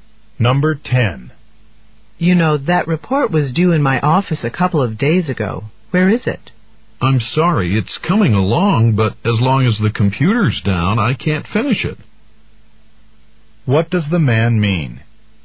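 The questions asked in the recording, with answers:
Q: What does the man mean?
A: He can't finish the report until the computer works again.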